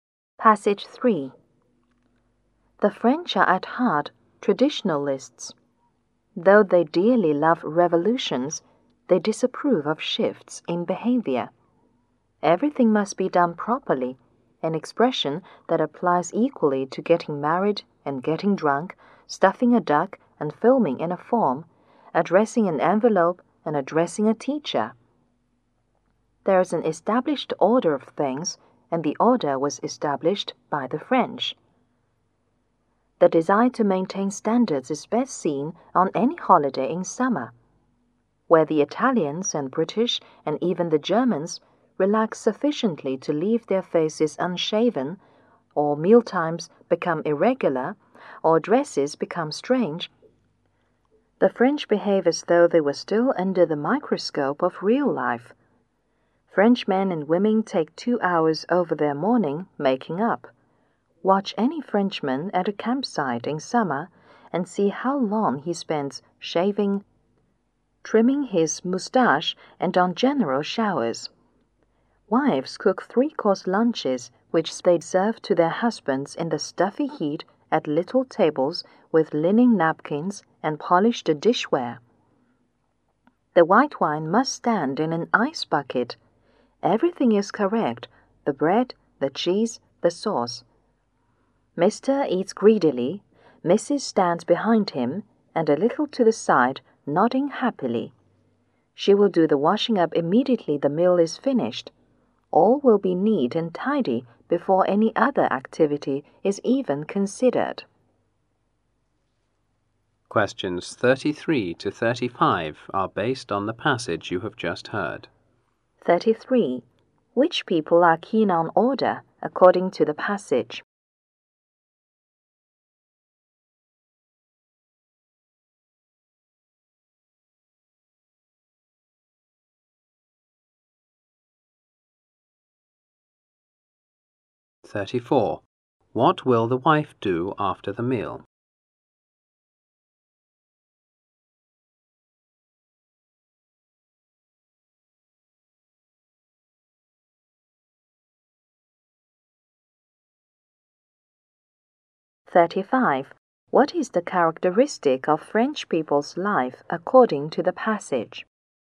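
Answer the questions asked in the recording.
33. The French
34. Do the washing up immediately
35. Everything must be done properly and in order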